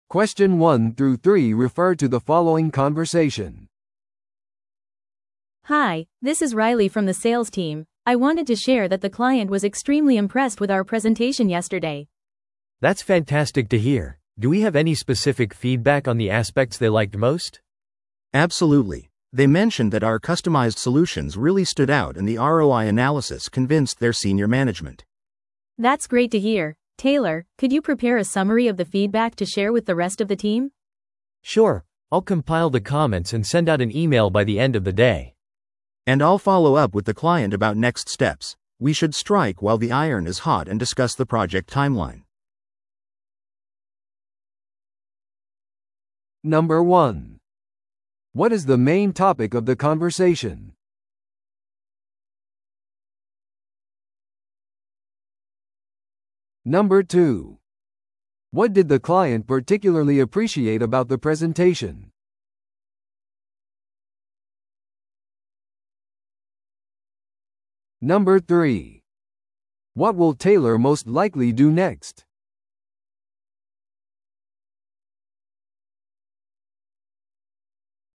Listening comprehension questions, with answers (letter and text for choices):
Listen to the audio below and answer the questions.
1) What is the main topic of the conversation?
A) クライアントとのフォローアップミーティングのスケジューリング。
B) プレゼンテーションからのクライアントフィードバックの共有。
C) 新しいマーケティング戦略についての議論。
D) 営業チームのパフォーマンスの評価。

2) What did the client particularly appreciate about the presentation?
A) 包括的な市場調査。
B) 明確で簡潔なスライド。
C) カスタマイズされたソリューションとROI分析。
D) インタラクティブな質疑応答セッション。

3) What will Taylor most likely do next?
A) 製品デモのためにクライアントに連絡する。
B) クライアントのフィードバックの要約を準備する。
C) 営業チームミーティングを組織する。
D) 最新の販売データを分析する。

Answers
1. B) プレゼンテーションからのクライアントフィードバックの共有。
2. C) カスタマイズされたソリューションとROI分析。
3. B) クライアントのフィードバックの要約を準備する。

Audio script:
A: Hi, this is Riley from the sales team. I wanted to share that the client was extremely impressed with our presentation yesterday.
B: That's fantastic to hear! Do we have any specific feedback on the aspects they liked most?
C: Absolutely. They mentioned that our customized solutions really stood out and the ROI analysis convinced their senior management.
A: That's great to hear. Taylor, could you prepare a summary of the feedback to share with the rest of the team?
B: Sure, I'll compile the comments and send out an email by the end of the day.
C: And I'll follow up with the client about next steps. We should strike while the iron is hot and discuss the project timeline.